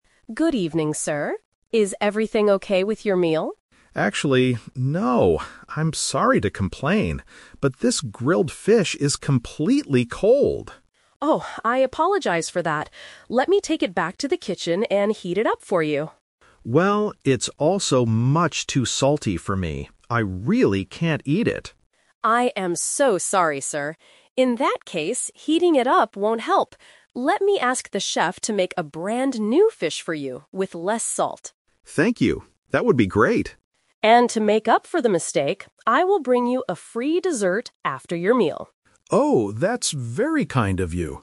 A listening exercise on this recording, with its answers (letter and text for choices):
Listen to the conversation between a customer and a restaurant manager, and choose the correct answer (A, B, or C) for each question.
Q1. What is wrong with the customer's food?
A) It is the wrong order.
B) It is too spicy.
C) It is cold and salty.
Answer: C) It is cold and salty.

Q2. What is the chef going to do to solve the problem?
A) Heat up the cold fish.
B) Make a brand new fish.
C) Cook a chicken dish instead.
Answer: B) Make a brand new fish.

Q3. What will the manager give the customer for free?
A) A drink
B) A salad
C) A dessert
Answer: C) A dessert

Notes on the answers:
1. The customer clearly states two problems: the fish is "completely cold" and "much too salty." Option (A) is a common restaurant problem but is not mentioned here. Option (B) is a trap; the food has too much salt, not too much spice.
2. The manager decides to "ask the chef to make a brand new fish." Option (A) is the trap; the manager originally offered to heat the fish up, but changed the plan when he heard it was also too salty. Option (C) is a plausible food item but is never mentioned.
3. At the end of the conversation, the manager says, "I will bring you a free dessert after your meal." Options (A) and (B) are plausible free items a restaurant might give, but they are not mentioned in the audio.

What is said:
Manager: Good evening, sir. Is everything okay with your meal?
Customer: Actually, no. I'm sorry to complain, but this grilled fish is completely cold.
Manager: Oh, I apologize for that. Let me take it back to the kitchen and heat it up for you.
Customer: Well, it's also much too salty for me. I really can't eat it.
Manager: I am so sorry, sir. In that case, heating it up won't help. Let me ask the chef to make a brand new fish for you, with less salt.
Customer: Thank you. That would be great.
Manager: And to make up for the mistake, I will bring you a free dessert after your meal.